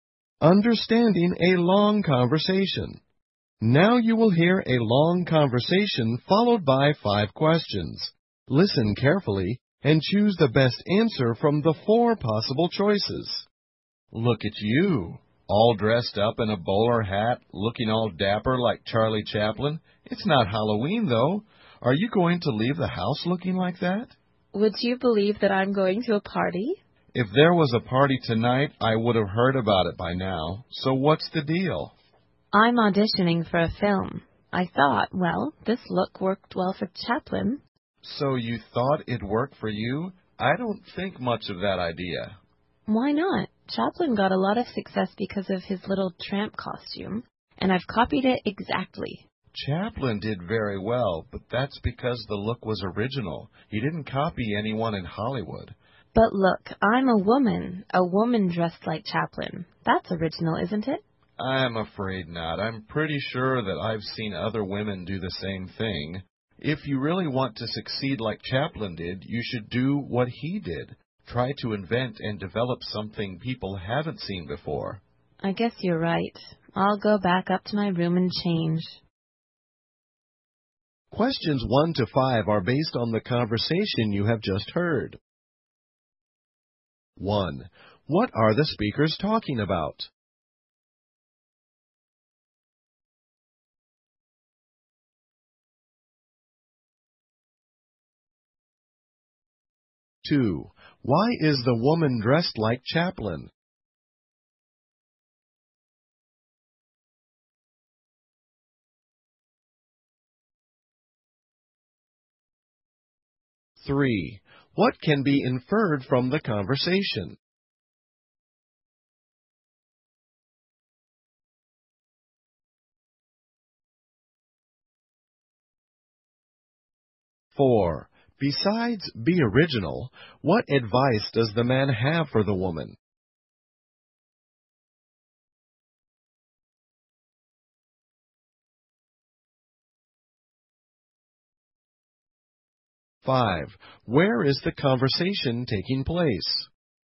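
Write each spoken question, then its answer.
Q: What are the speakers talking about?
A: The woman dressing like Chaplin for an audition

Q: Why is the woman dressed like Chaplin?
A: She is auditioning for a film

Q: Besides be original, what advice does the man have for the woman?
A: Invent and develop something people haven't seen before

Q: Where is the conversation taking place?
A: At the woman's home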